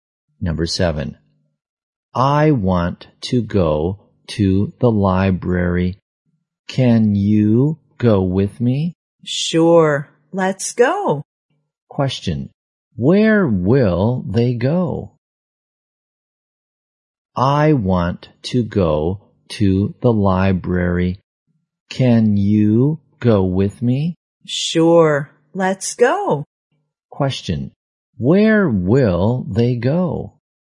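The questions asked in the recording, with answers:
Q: Question. Where will they go?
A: To the library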